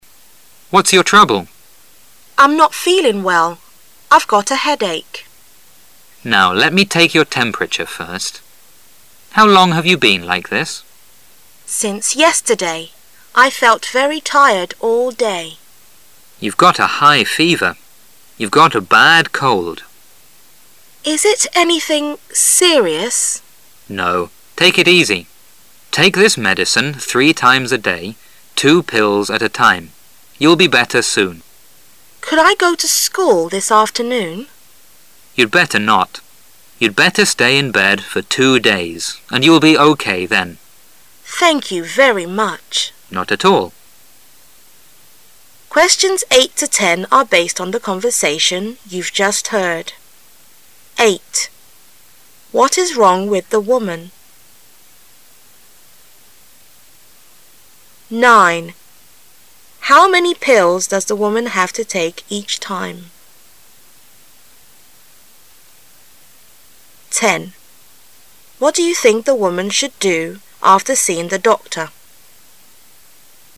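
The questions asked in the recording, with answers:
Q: What is wrong with the woman?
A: She has a bad cold with a high fever and a headache.

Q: How many pills does the woman have to take each time?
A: Two

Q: What do you think the woman should do after seeing the doctor?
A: Stay in bed for 2 days and take the medicine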